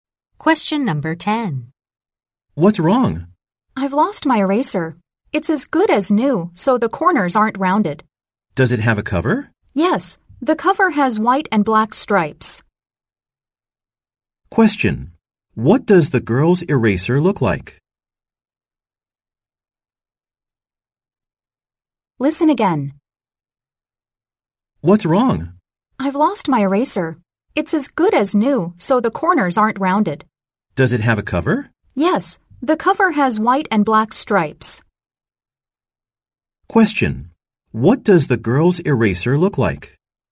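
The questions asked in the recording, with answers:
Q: What does the girl's eraser look like?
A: It looks new, with corners that aren't rounded, and it has a cover with white and black stripes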